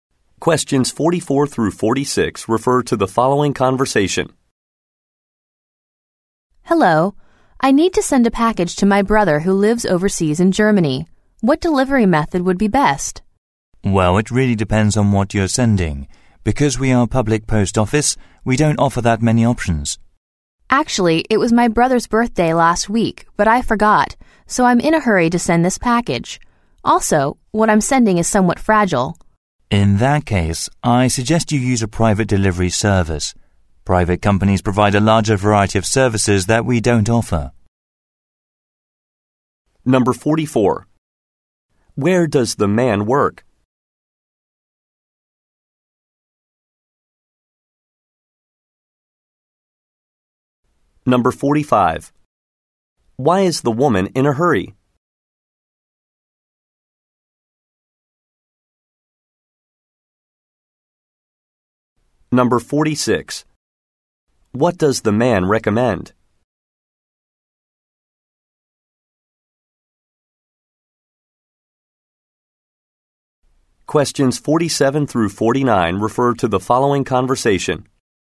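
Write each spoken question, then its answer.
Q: Where does the man work?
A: At a post office

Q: Why is the woman in a hurry?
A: She forgot her brother's birthday

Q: What does the man recommend?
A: Using a private delivery service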